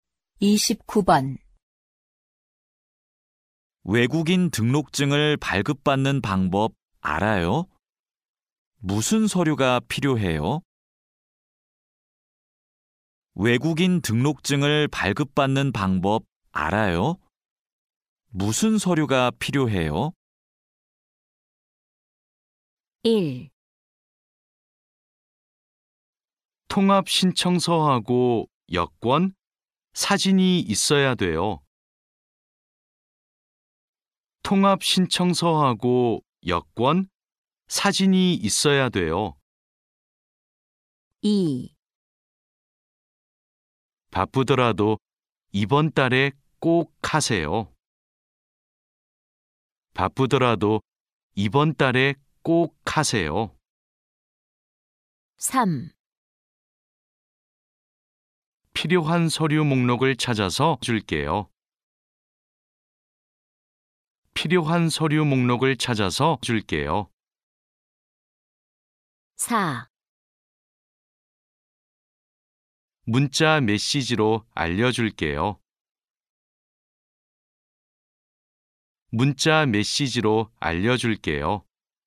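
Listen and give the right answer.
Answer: 1: 통합 신청서하고 여권, 사진이 있어야 돼요.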